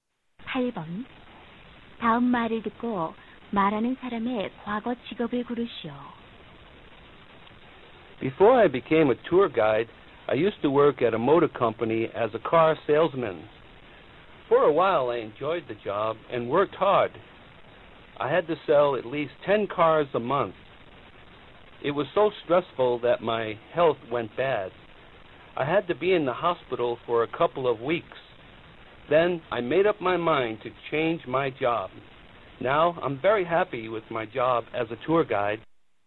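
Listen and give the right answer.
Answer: 자동차 판매원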